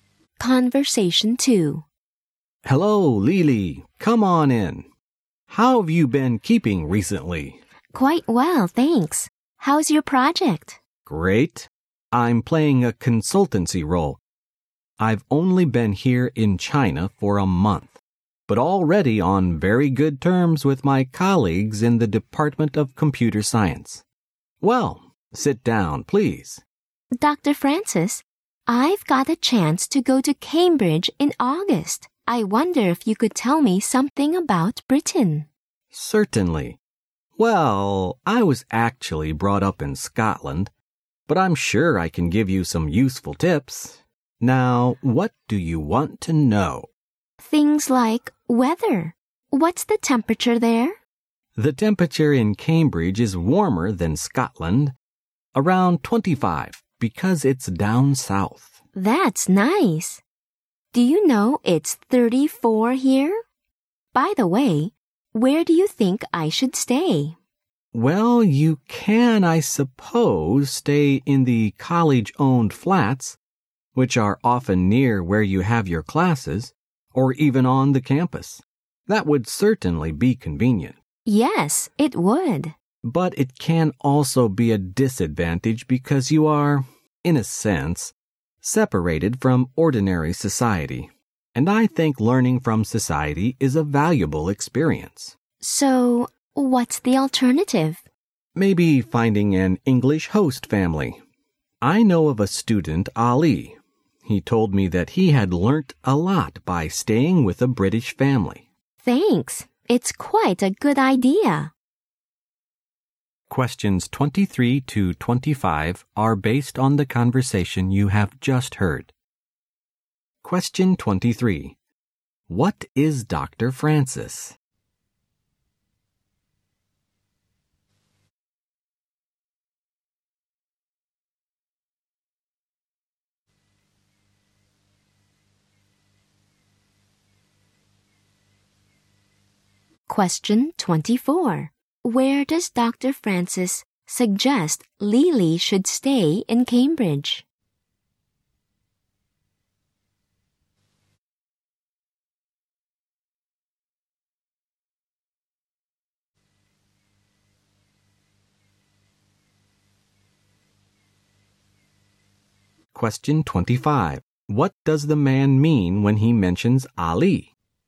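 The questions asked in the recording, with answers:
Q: Where does Dr. Francis suggest Lily should stay in Cambridge?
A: With an English host family

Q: What does the man mean when he mentions Ali?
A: Staying with a British family is a good way to learn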